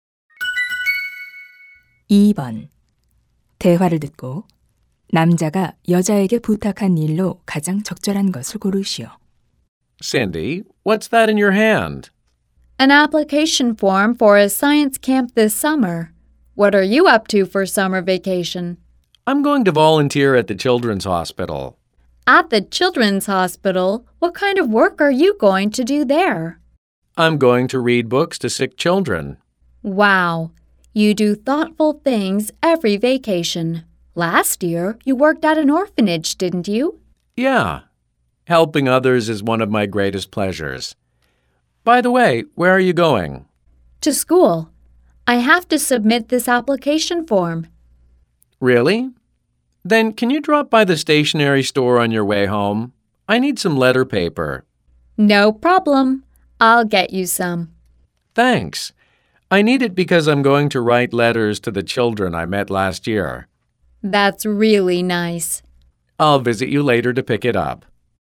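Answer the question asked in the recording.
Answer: 문구점에서 편지지 사 오기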